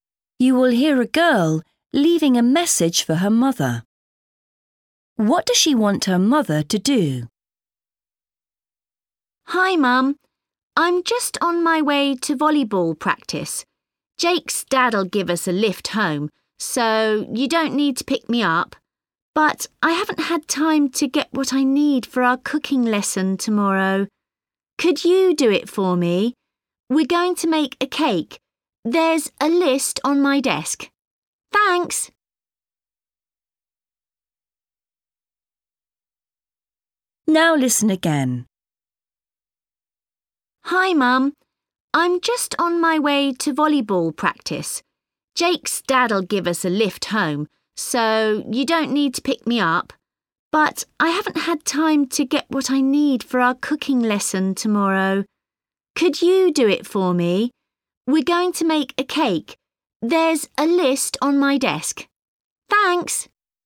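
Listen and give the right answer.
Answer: Buy what she needs for her cooking lesson (cake ingredients)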